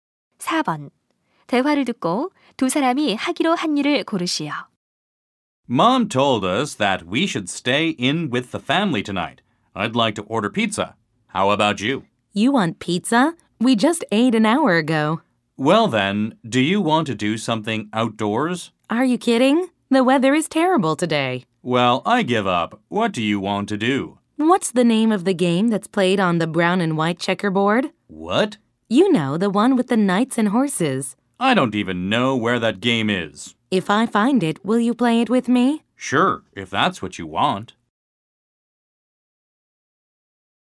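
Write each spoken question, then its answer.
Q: 대화를 듣고 두 사람이 하기로 한 일을 고르시오.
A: 체스 두기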